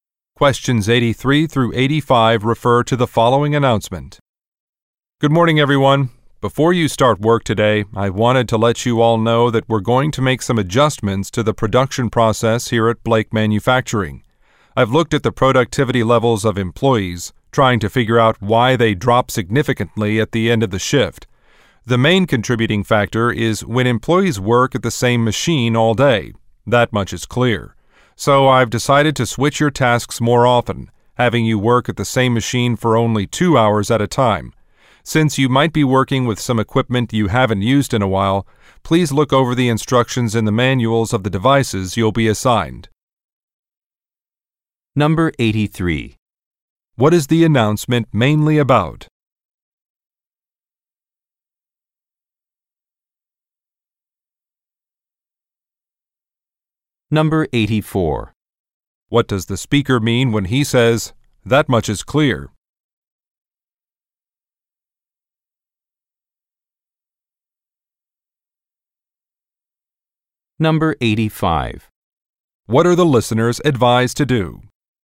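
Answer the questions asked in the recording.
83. Changes to the production process
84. He is sure of the cause of the productivity drop
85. Read the equipment manuals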